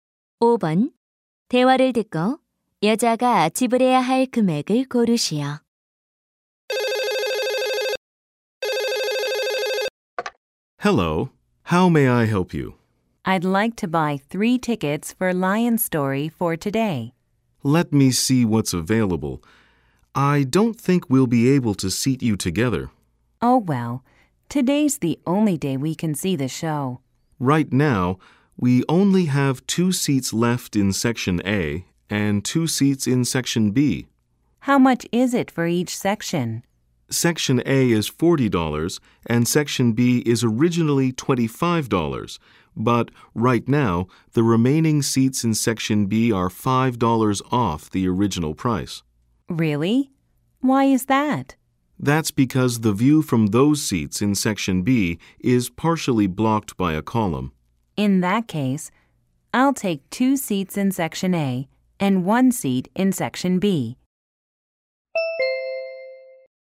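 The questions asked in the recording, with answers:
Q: 대화를 듣고 여자가 지불해야 할 금액을 고르시오.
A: 100달러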